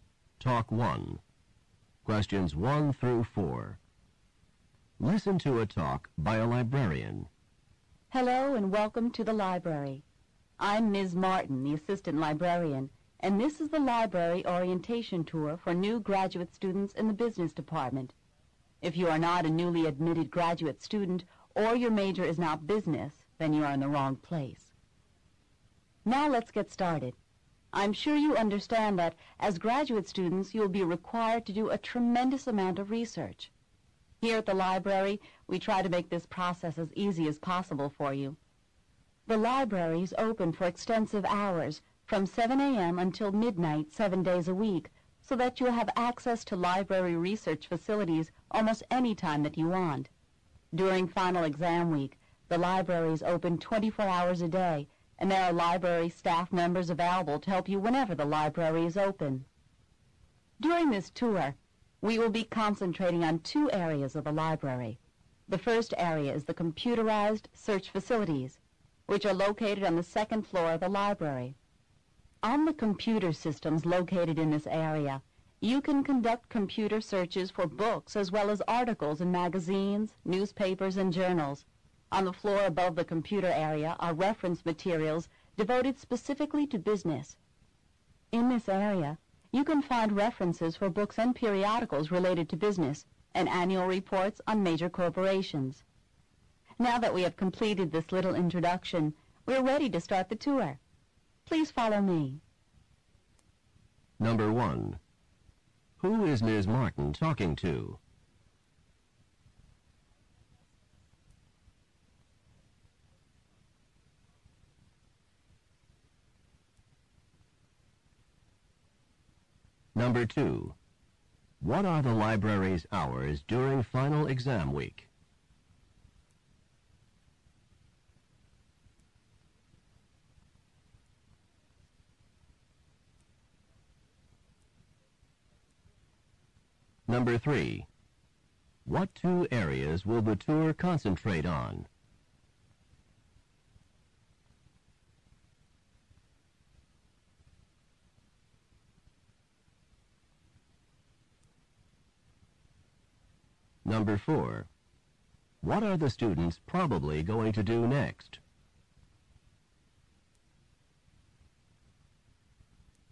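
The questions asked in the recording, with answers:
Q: Who is Ms. Martin talking to?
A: New graduate business students

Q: What are the library's hours during final exam week?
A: 24 hours a day

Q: What two areas will the tour concentrate on?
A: The computerized search facilities and the business reference materials

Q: What are the students probably going to do next?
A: Take the library tour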